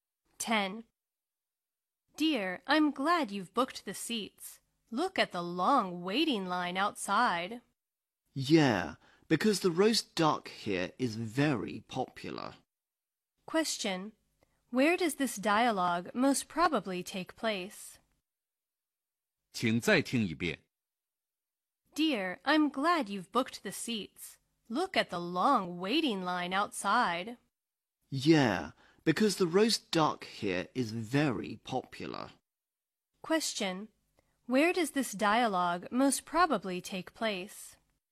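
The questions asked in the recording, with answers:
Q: Where does this dialogue most probably take place?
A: In a restaurant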